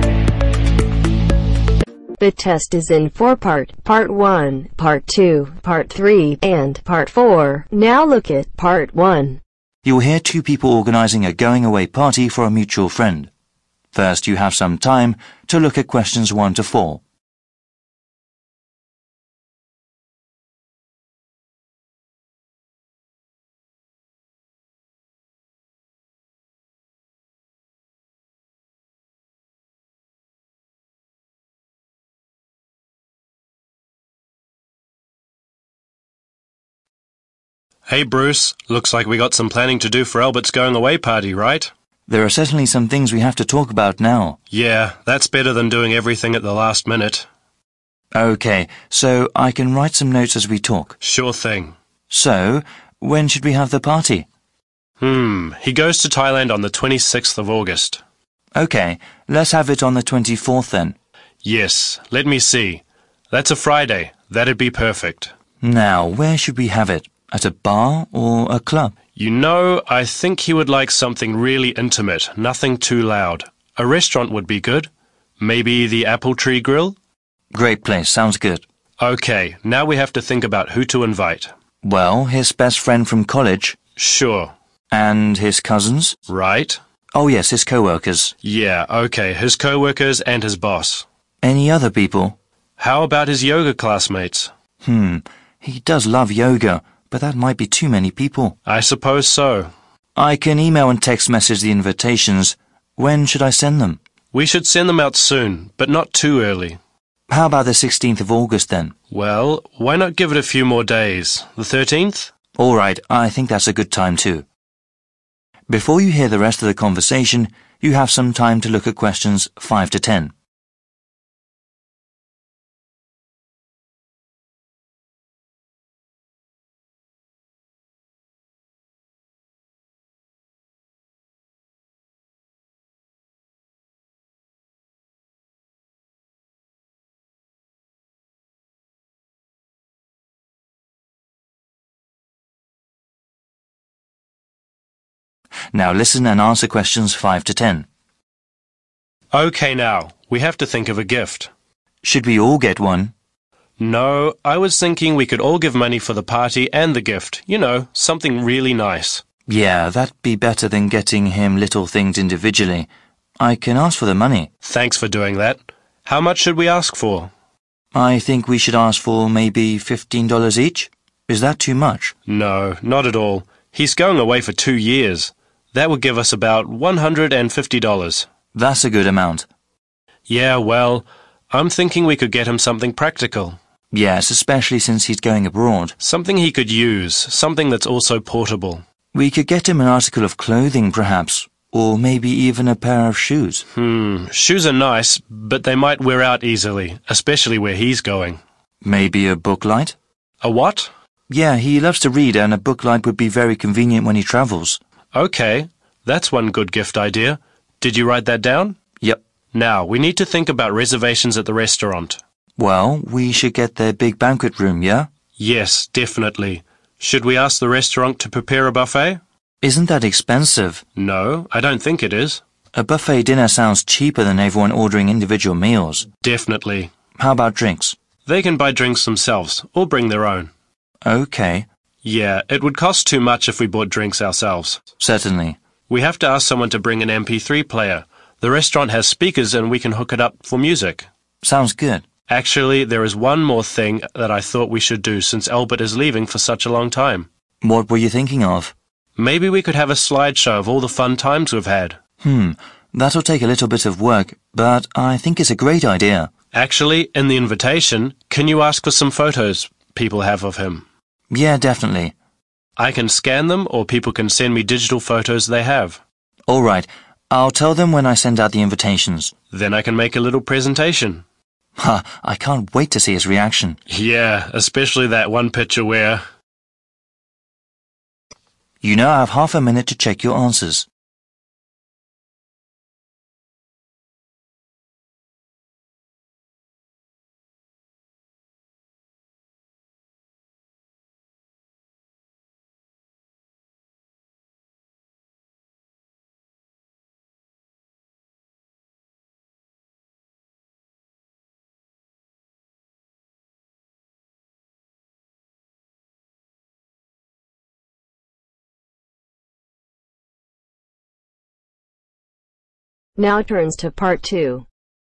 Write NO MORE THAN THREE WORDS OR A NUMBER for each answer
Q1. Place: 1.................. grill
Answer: Apple Tree

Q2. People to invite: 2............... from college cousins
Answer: Best friend

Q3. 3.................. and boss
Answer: Coworkers

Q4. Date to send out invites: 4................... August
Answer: Thirteenth of /13th/13

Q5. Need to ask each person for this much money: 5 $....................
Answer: 15

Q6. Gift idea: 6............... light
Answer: Book

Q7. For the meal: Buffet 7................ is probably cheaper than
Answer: dinner

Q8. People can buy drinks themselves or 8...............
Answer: bring their own

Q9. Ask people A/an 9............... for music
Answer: MP3 player

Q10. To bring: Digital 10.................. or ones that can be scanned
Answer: photos